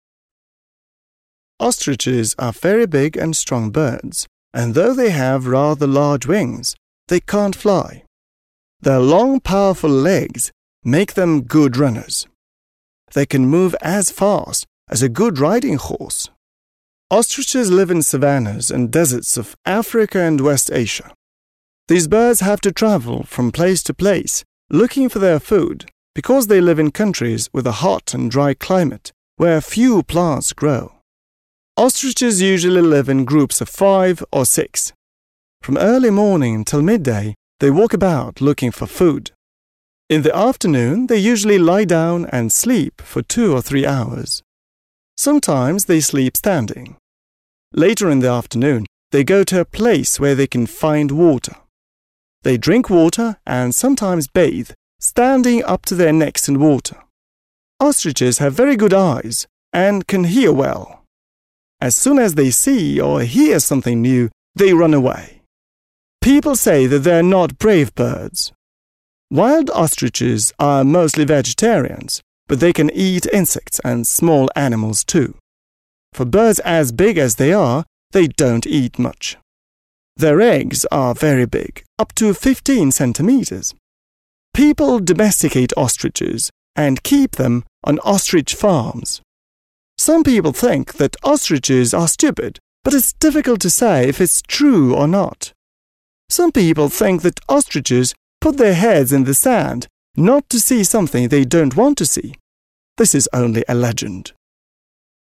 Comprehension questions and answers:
Listen and say which of these statements are true and which are false.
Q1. Ostriches have no wings.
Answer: False

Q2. Ostriches can run as fast as some animals.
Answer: True

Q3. Ostriches live in Asia, Africa and South America.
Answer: False

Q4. Ostriches hate water because they can get wet.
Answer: False

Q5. Ostriches eat only plants and nothing else.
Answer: False

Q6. Ostriches live only in the wild.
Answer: False

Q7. Not everything that people believe about ostriches is true.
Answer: True

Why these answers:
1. В тексте четко сказано, что у них есть довольно большие крылья, хотя они и не могут летать.
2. Автор сравнивает скорость страуса со скоростью хорошей верховой лошади.
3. Согласно аудиозаписи, их ареал обитания ограничивается Африкой и Западной Азией; Южная Америка не упоминается.
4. На самом деле страусы любят воду, они пьют её и часто купаются, заходя в водоем по самую шею.
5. Хотя они в основном вегетарианцы, дикие страусы также употребляют в пищу насекомых и мелких животных.
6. В тексте упоминается, что люди одомашнивают этих птиц и разводят их на специальных страусиных фермах.
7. Это утверждение верно, так как в конце текста развенчивается популярный миф о том, что страусы прячут голову в песок от страха.

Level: 7 Класс